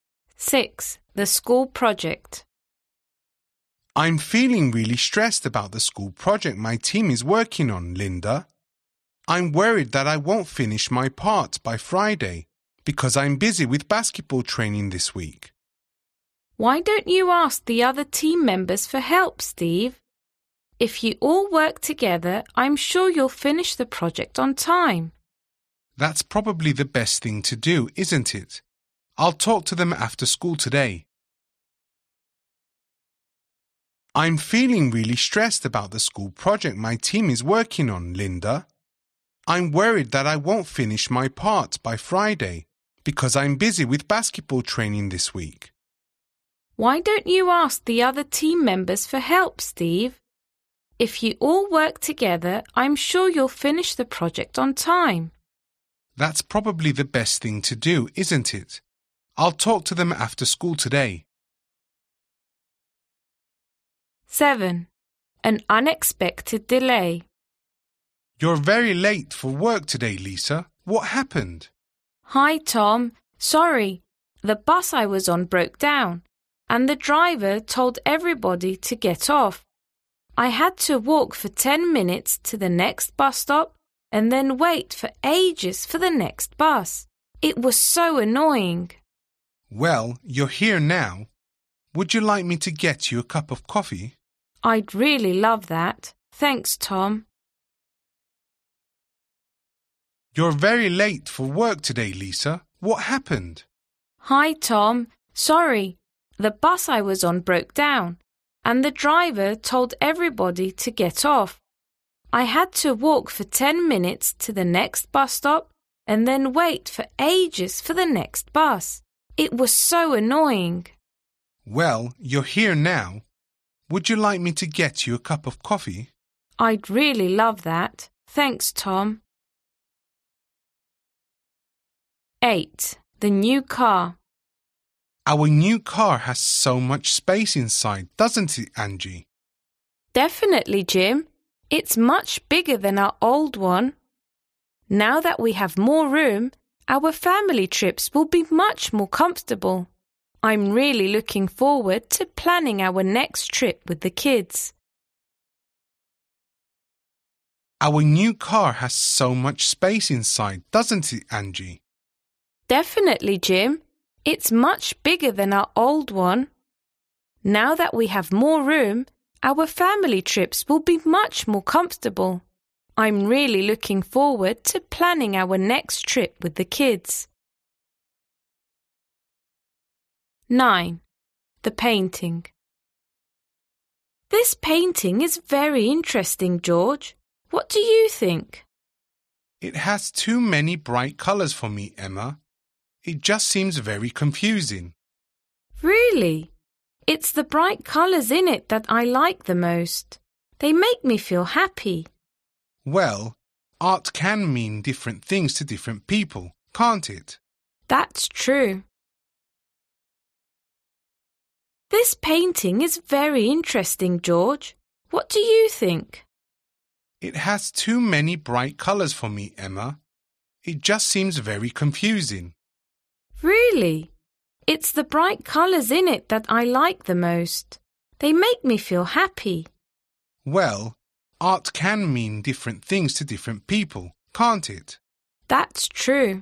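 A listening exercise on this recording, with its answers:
Listen to 9 short conversations. For questions 1-9, choose the best answer (A, B or C).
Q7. Why was Lisa late for work?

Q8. What are Jim and Angie talking about?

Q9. According to what you hear, how does Emma feel about the painting?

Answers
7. The bus she was on broke down
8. How spacious their new car is
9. She likes its bright colours; they make her happy

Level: LRN B2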